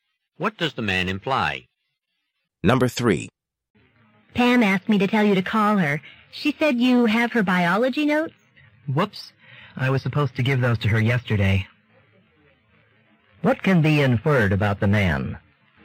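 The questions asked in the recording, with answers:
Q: What can be inferred about the man?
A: He forgot to give Pam her biology notes.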